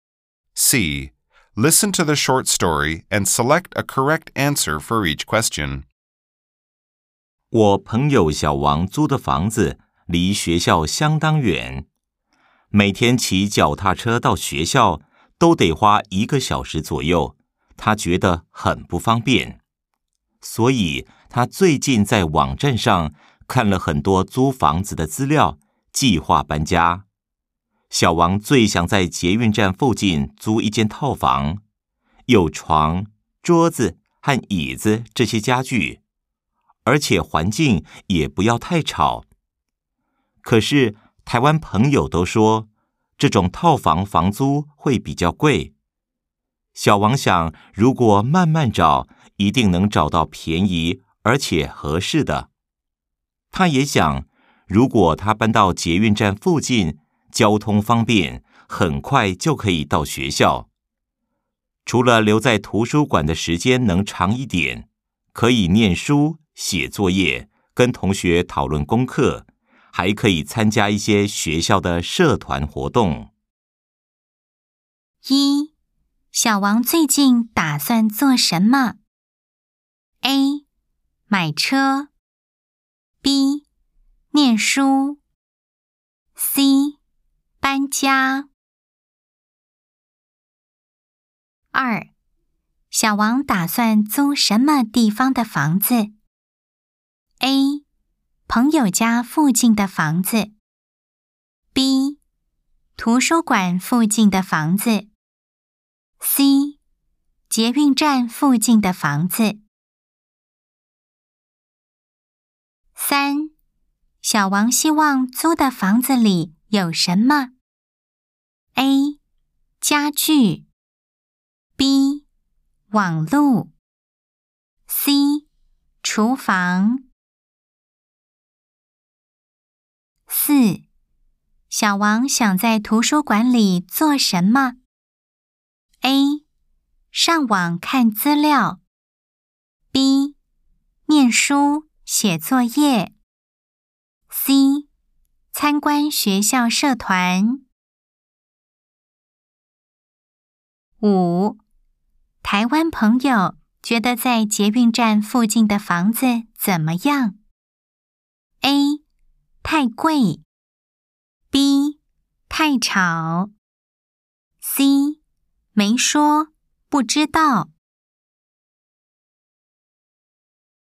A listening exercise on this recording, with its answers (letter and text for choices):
Nghe câu chuyện ngắn và chọn câu trả lời đúng.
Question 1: 小王最近打算做什麼?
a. 買車。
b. 念書。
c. 搬家。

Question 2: 小王打算租什麼地方的房子?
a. 朋友家附近的房子。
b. 圖書館附近的房子。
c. 捷運站附近的房子。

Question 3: 小王希望租的房子裡有什麼?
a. 家具。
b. 網路。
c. 廚房。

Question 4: 小王想在圖書館裡做什麼?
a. 上網看資料。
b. 念書、寫作業。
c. 參觀學校社團。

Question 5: 台灣朋友覺得在捷運站附近的房子怎麼樣?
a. 太貴。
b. 太吵。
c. 沒說,不知道。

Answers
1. c. 搬家。
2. c. 捷運站附近的房子。
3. a. 家具。
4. b. 念書、寫作業。
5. a. 太貴。